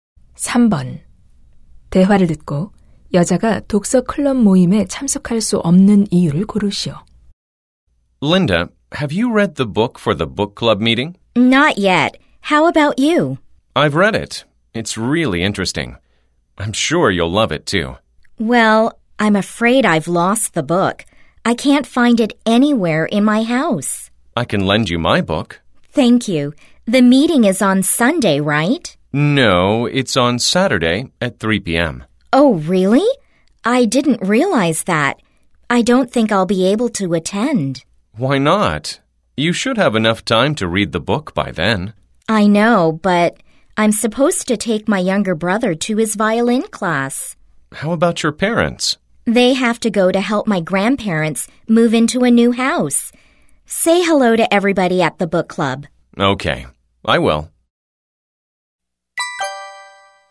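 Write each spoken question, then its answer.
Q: 대화를 듣고 여자가 독서 클럽 모임에 참석할 수 없는 이유를 고르시오.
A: 남동생을 바이올린 수업에 데려다줘야 해서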